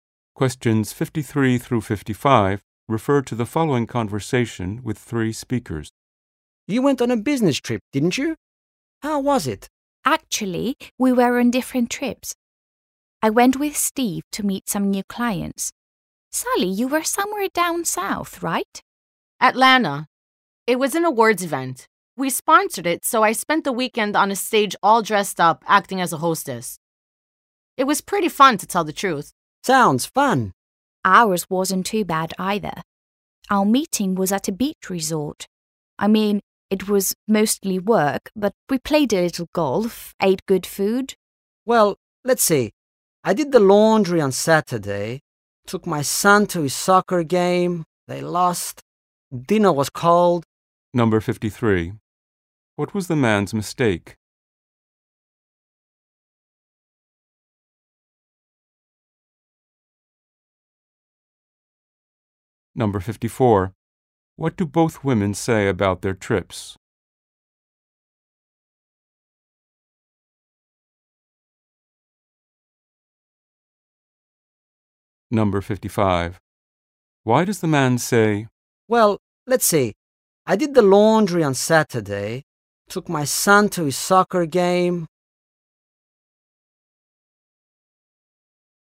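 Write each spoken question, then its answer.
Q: What was the man's mistake?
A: He thought the women went on the same trip

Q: What do both women say about their trips?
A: They were fun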